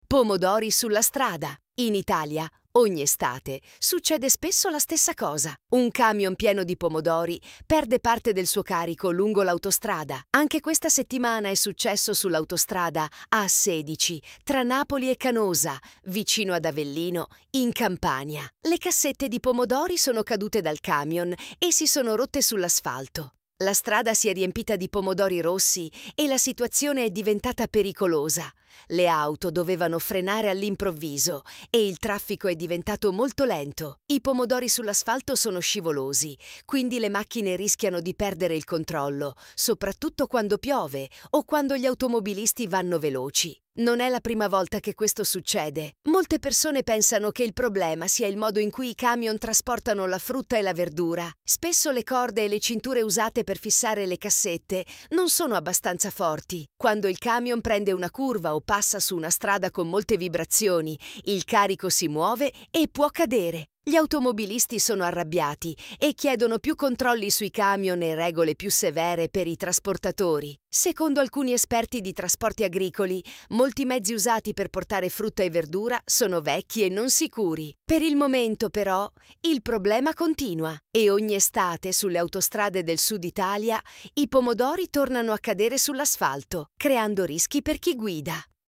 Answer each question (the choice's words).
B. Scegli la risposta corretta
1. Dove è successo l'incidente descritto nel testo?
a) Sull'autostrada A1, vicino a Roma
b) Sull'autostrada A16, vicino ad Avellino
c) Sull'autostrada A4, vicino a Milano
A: Sull'autostrada A16, vicino ad Avellino

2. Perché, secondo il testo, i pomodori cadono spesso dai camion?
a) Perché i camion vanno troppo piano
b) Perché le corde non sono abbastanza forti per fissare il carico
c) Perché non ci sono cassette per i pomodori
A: Perché le corde non sono abbastanza forti per fissare il carico

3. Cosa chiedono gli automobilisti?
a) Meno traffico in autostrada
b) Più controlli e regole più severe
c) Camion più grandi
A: Più controlli e regole più severe

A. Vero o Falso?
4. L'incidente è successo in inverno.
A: F

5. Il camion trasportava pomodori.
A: V

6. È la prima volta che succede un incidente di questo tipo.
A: F

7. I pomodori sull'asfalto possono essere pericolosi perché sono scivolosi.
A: V

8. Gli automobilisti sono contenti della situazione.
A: F

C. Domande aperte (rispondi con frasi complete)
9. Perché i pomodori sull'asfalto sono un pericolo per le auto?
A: I pomodori sull'asfalto sono pericolosi perché rendono la strada scivolosa: le auto possono perdere il controllo, soprattutto se piove o se vanno veloci, e questo può causare incidenti.

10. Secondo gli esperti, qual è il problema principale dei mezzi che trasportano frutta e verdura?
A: Il problema principale, secondo gli esperti, è che molti mezzi usati per trasportare frutta e verdura sono vecchi e i sistemi per fissare il carico (come corde e cinture) non sono abbastanza sicuri.

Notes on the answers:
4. L'incidente è successo in estate (agosto), non in inverno.
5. Sì, il camion trasportava pomodori.
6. Il testo dice che non è la prima volta; succede spesso, quasi ogni estate.
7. Corretto, i pomodori sull'asfalto sono scivolosi e pericolosi.
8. Gli automobilisti sono arrabbiati/esasperati, non contenti.

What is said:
Pomodori sulla strada
In Italia, ogni estate, succede spesso la stessa cosa: un camion pieno di pomodori perde parte del suo carico lungo l'autostrada. Anche questa settimana è successo sull'autostrada A16, tra Napoli e Canosa, vicino ad Avellino, in Campania.
Le cassette di pomodori sono cadute dal camion e si sono rotte sull'asfalto. La strada si è riempita di pomodori rossi e la situazione è diventata pericolosa: le auto dovevano frenare all'improvviso e il traffico è diventato molto lento. I pomodori sull'asfalto sono scivolosi, quindi le macchine rischiano di perdere il controllo, soprattutto quando piove o quando gli automobilisti vanno veloci.
Non è la prima volta che questo succede. Molte persone pensano che il problema sia il modo in cui i camion trasportano la frutta e la verdura. Spesso le corde e le cinture usate per fissare le cassette non sono abbastanza forti. Quando il camion prende una curva o passa su una strada con molte vibrazioni, il carico si muove e può cadere.
Gli automobilisti sono arrabbiati e chiedono più controlli sui camion e regole più severe per i trasportatori. Secondo alcuni esperti di trasporti agricoli, molti mezzi usati per portare frutta e verdura sono vecchi e non sicuri.
Per il momento, però, il problema continua. E ogni estate, sulle autostrade del Sud Italia, i pomodori tornano a cadere sull'asfalto, creando rischi per chi guida.